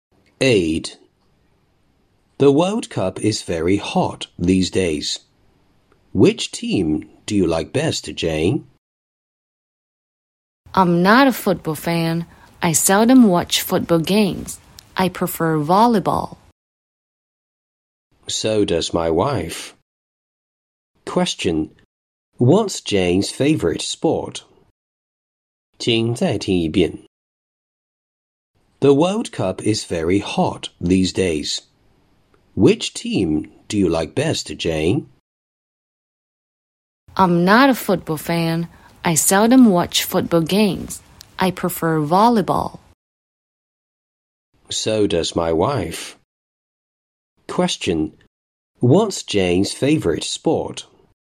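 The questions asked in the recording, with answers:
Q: What's Jane's favorite sport?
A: Volleyball.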